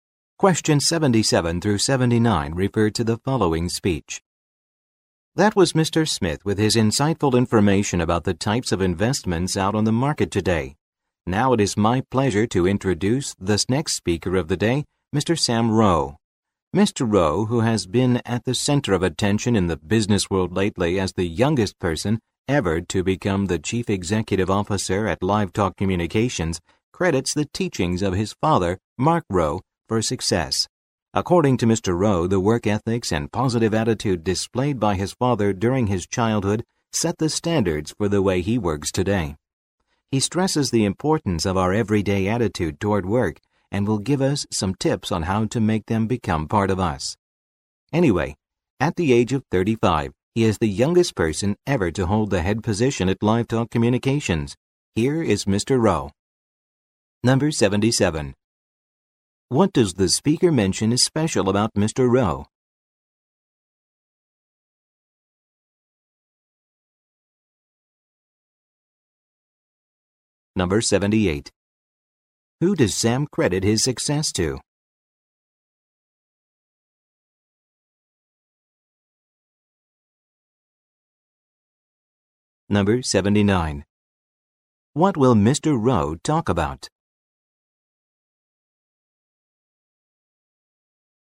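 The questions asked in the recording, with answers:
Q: What does the speaker mention is special about Mr.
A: He is the youngest person ever to become CEO of LiveTalk Communications

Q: Who does Sam credit his success to?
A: His father, Mark Rowe

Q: What will Mr. Rowe talk about?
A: Tips on making a good everyday attitude toward work part of us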